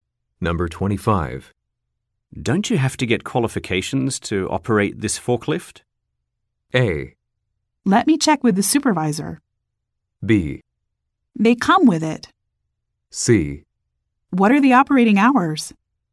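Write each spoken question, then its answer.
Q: Don't you have to get qualifications to operate this forklift?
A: A: Let me check with the supervisor.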